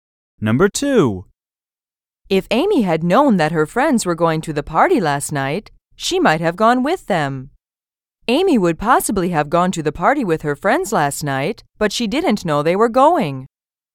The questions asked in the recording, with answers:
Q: Amy would possibly have gone to the party with her friends last night, but she didn't know they were going.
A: Same is the correct answer.